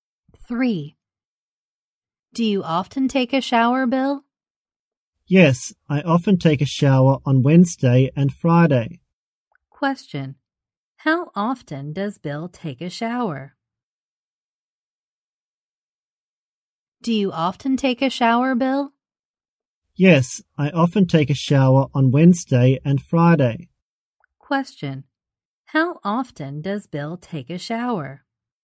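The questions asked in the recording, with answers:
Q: How often does Bill take a shower?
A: Twice a week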